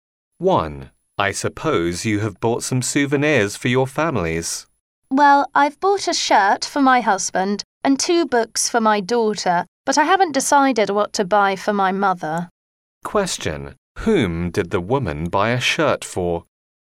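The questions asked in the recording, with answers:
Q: Whom did the woman buy a shirt for?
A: Her husband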